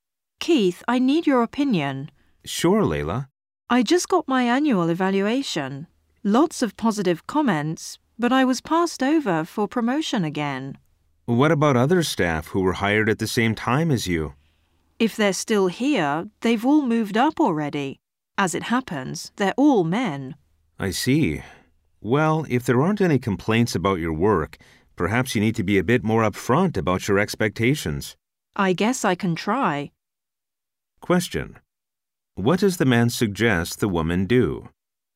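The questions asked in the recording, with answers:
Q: What does the man suggest the woman do?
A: Be more upfront about her expectations (ask for promotion more directly).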